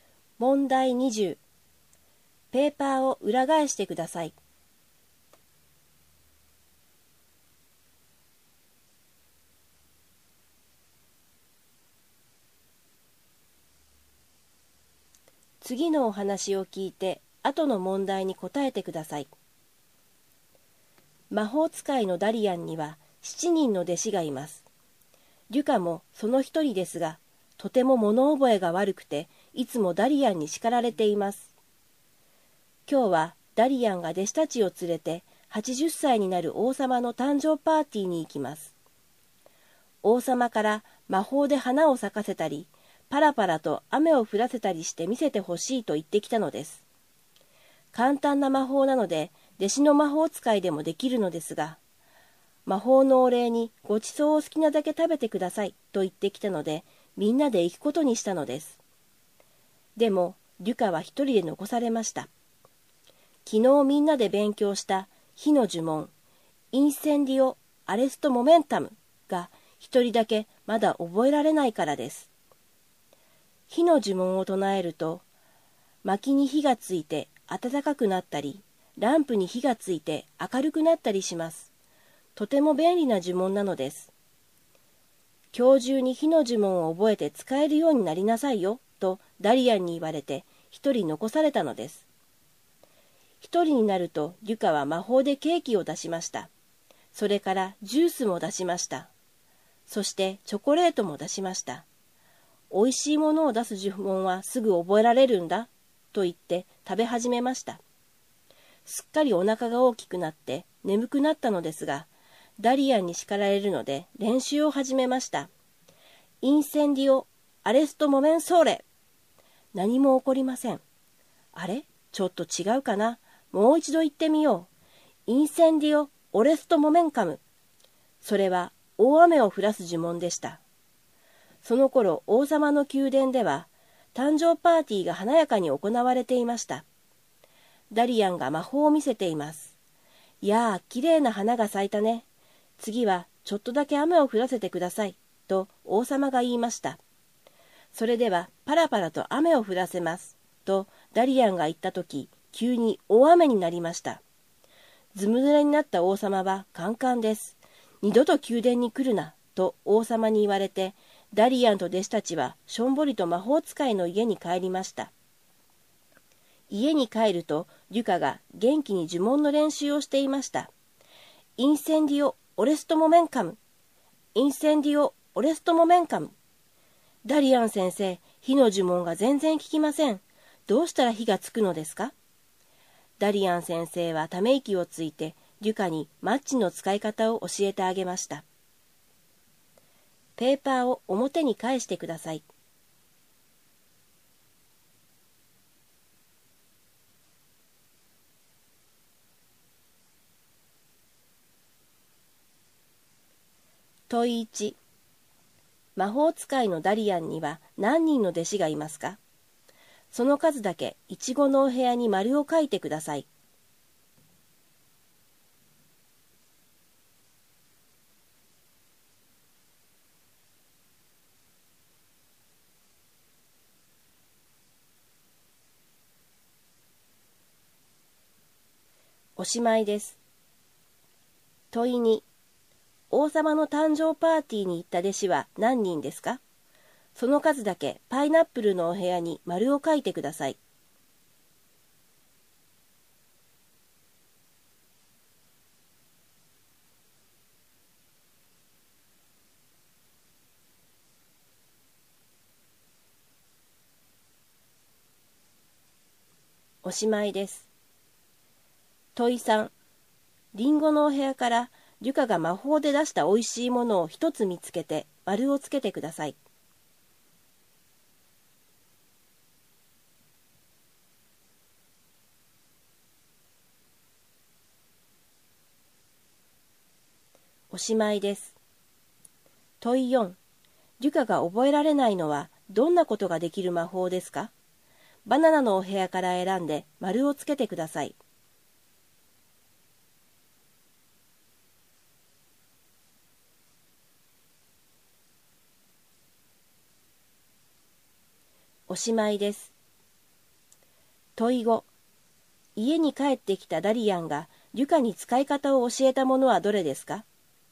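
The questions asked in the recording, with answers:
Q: 魔法使いのダリアンには何人の弟子がいますか?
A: 7人

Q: 王様の誕生パーティーに行った弟子は何人ですか?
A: 6人

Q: リュカが覚えられないのはどんなことができる魔法ですか?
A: 火をつける魔法

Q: 家に帰ってきたダリアンがリュカに使い方を教えたものはどれですか?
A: マッチ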